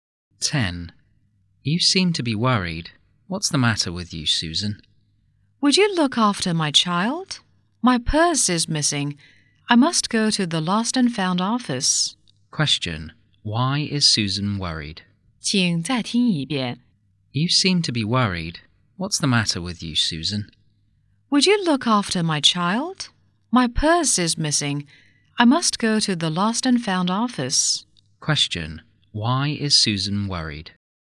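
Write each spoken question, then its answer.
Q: Question. Why is Susan worried?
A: Her purse is missing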